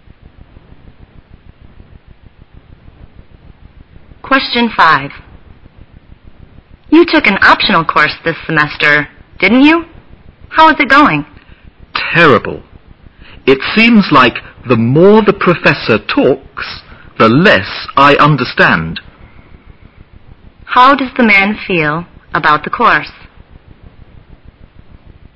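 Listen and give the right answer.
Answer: It is terrible; he finds it hard to understand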